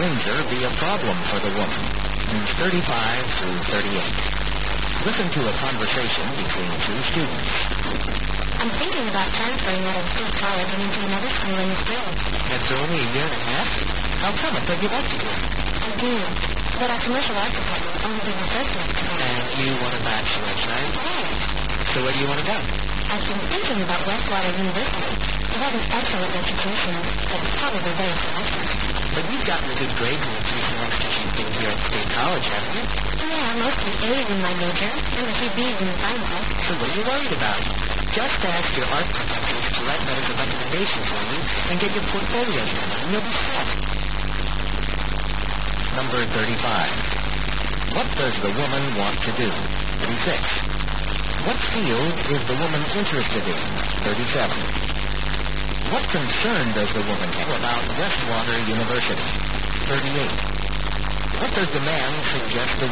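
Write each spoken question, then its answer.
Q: What does the woman want to do?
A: Transfer to another school

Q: What field is the woman interested in?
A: Commercial art

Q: What concern does the woman have about Westwater University?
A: It is very selective

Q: What does the man suggest the woman do?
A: Get recommendation letters from her art professors and prepare her portfolio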